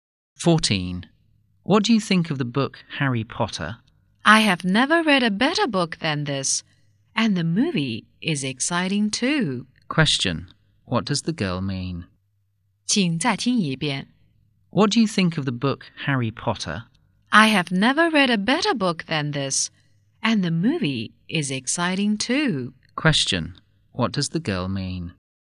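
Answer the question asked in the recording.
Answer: Harry Potter is the best book she has ever read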